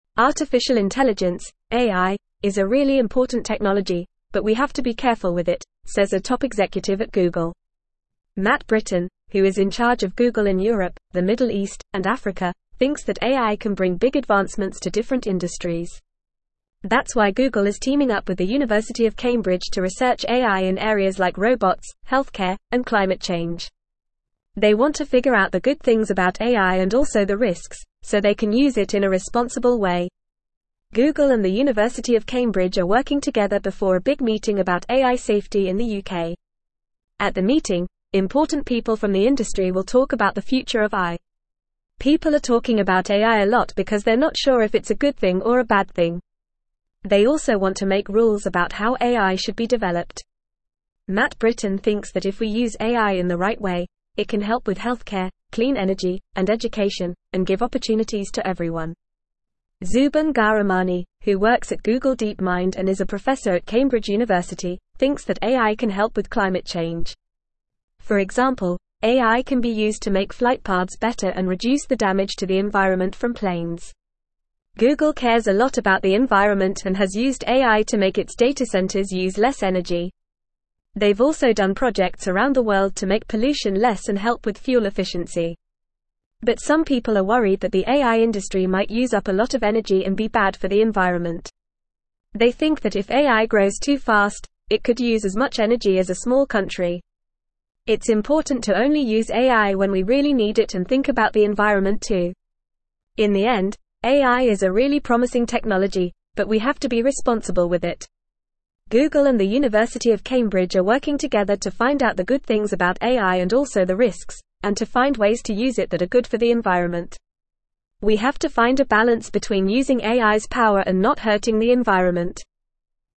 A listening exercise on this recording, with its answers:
Listen and Fill in the Gaps:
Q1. Matt Brittin, who is in charge of Google in Europe, the (1)______ East, and Africa, thinks that AI can (2)______ big advancements to different industries.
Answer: Middle

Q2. Matt Brittin, who is in charge of Google in Europe, the (1)______ East, and Africa, thinks that AI can (2)______ big advancements to different industries.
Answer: bring

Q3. That's why Google is teaming up with the University of (3)______ to (4)______ AI in areas like robots, healthcare, and climate change.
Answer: Cambridge

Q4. That's why Google is teaming up with the University of (3)______ to (4)______ AI in areas like robots, healthcare, and climate change.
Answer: research

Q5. At the meeting, important people from the (5)______ will talk about the future of AI.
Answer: industry

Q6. Matt (6)______ thinks that if we use AI in the right way, it can help with (7)______, (8)______ energy, and education, and give opportunities to everyone.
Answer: Brittin

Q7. Matt (6)______ thinks that if we use AI in the right way, it can help with (7)______, (8)______ energy, and education, and give opportunities to everyone.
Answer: healthcare

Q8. Matt (6)______ thinks that if we use AI in the right way, it can help with (7)______, (8)______ energy, and education, and give opportunities to everyone.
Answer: clean

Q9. Zoubin Ghahramani, who works at Google DeepMind and is a professor at Cambridge University, (9)______ that AI can help with (10)______ change.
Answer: thinks

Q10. Zoubin Ghahramani, who works at Google DeepMind and is a professor at Cambridge University, (9)______ that AI can help with (10)______ change.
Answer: climate

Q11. For (11)______, AI can be used to make flight paths better and (12)______ the damage to the environment from planes.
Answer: example

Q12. For (11)______, AI can be used to make flight paths better and (12)______ the damage to the environment from planes.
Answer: reduce

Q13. It's (13)______ to only use AI when we really need it and think about the environment too.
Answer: important

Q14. (14)______ and the University of Cambridge are working together to find out the good (15)______ about AI and also the risks, and to find ways to use it that are good for the environment.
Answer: Google

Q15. (14)______ and the University of Cambridge are working together to find out the good (15)______ about AI and also the risks, and to find ways to use it that are good for the environment.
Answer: things

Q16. We have to find a balance between using AI's (16)______ and not hurting the environment.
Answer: power

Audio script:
Artificial Intelligence (AI) is a really important technology, but we have to be careful with it, says a top executive at Google. Matt Brittin, who is in charge of Google in Europe, the Middle East, and Africa, thinks that AI can bring big advancements to different industries. That's why Google is teaming up with the University of Cambridge to research AI in areas like robots, healthcare, and climate change. They want to figure out the good things about AI and also the risks, so they can use it in a responsible way.
Google and the University of Cambridge are working together before a big meeting about AI safety in the UK. At the meeting, important people from the industry will talk about the future of AI. People are talking about AI a lot because they're not sure if it's a good thing or a bad thing. They also want to make rules about how AI should be developed. Matt Brittin thinks that if we use AI in the right way, it can help with healthcare, clean energy, and education, and give opportunities to everyone.
Zoubin Ghahramani, who works at Google DeepMind and is a professor at Cambridge University, thinks that AI can help with climate change. For example, AI can be used to make flight paths better and reduce the damage to the environment from planes. Google cares a lot about the environment and has used AI to make its data centers use less energy. They've also done projects around the world to make pollution less and help with fuel efficiency.
But some people are worried that the AI industry might use up a lot of energy and be bad for the environment. They think that if AI grows too fast, it could use as much energy as a small country. It's important to only use AI when we really need it and think about the environment too.
Google and the University of Cambridge are working together to find out the good things about AI and also the risks, and to find ways to use it that are good for the environment. We have to find a balance between using AI's power and not hurting the environment.

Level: Level 3